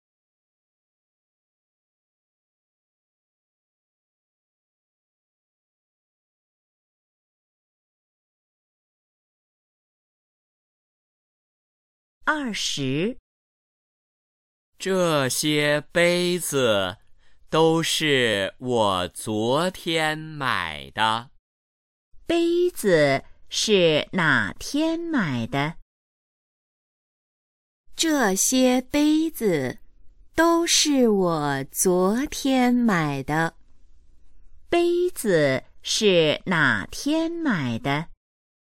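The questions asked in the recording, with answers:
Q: 杯子是哪天买的?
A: 昨天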